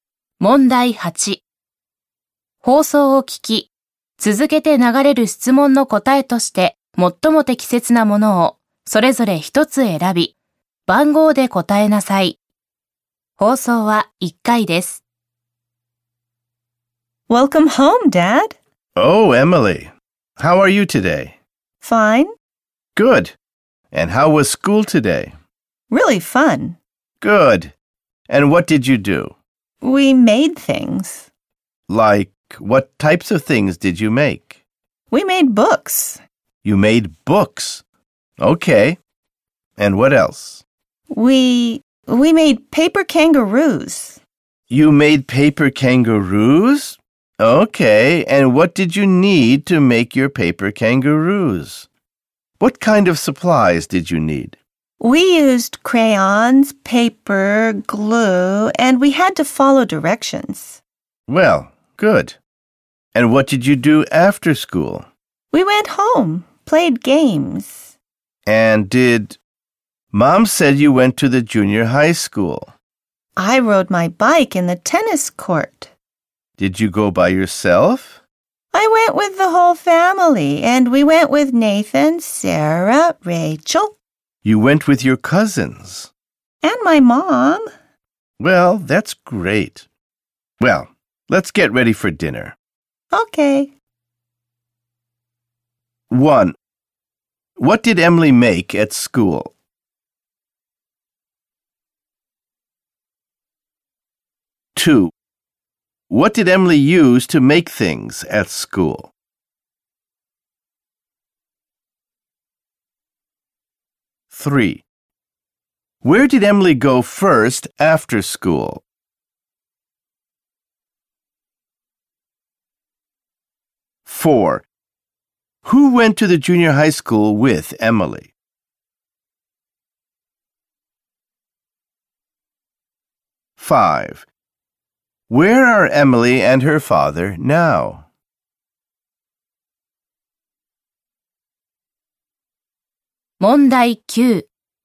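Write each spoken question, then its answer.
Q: What did Emily make at school?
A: Books and paper kangaroos

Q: What did Emily use to make things at school?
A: Crayons, paper and glue

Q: Where did Emily go first after school?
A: Home

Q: Who went to the junior high school with Emily?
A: Her whole family, including her cousins and her mom

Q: Where are Emily and her father now?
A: At home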